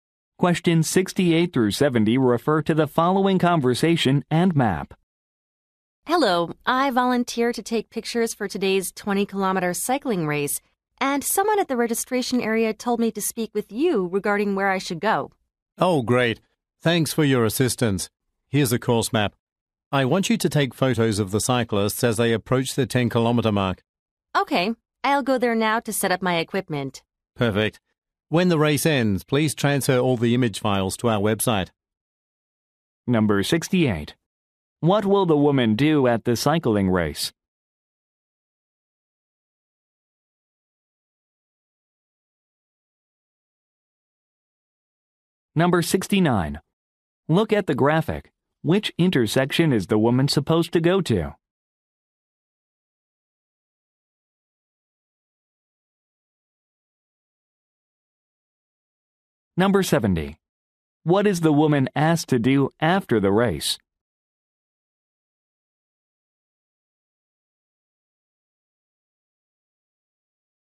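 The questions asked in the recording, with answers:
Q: What will the woman do at the cycling race?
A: Take photos

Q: What is the woman asked to do after the race?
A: Transfer the image files to the website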